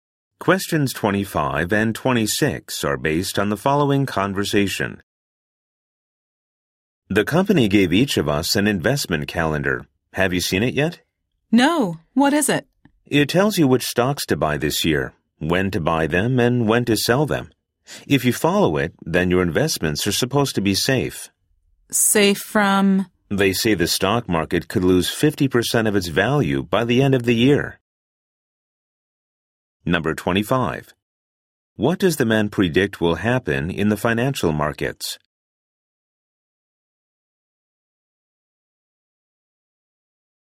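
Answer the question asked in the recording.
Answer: The stock market could lose 50% of its value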